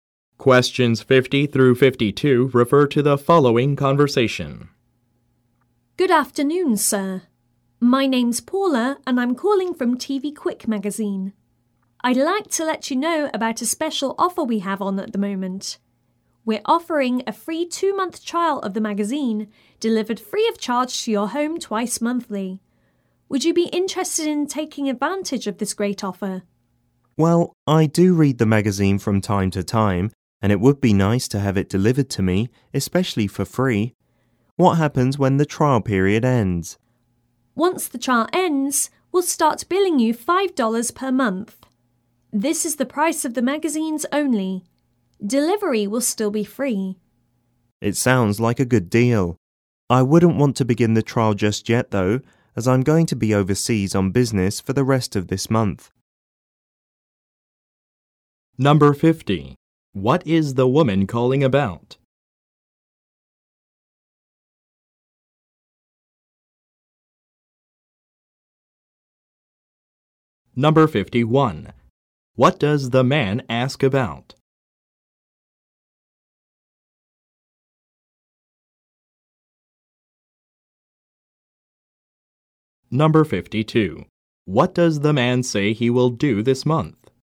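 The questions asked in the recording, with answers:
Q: What is the woman calling about?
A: A special offer of a free 2-month magazine trial

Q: What does the man ask about?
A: What happens when the trial period ends

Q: What does the man say he will do this month?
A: Go overseas on business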